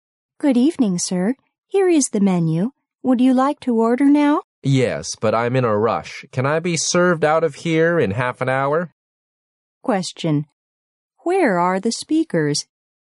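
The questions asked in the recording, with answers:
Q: Where are the speakers?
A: In a restaurant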